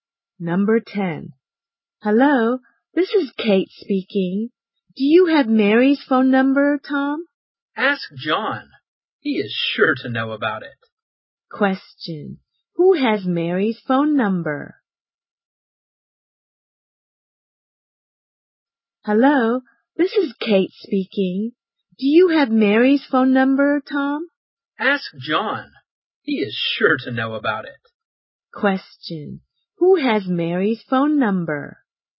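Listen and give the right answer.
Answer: John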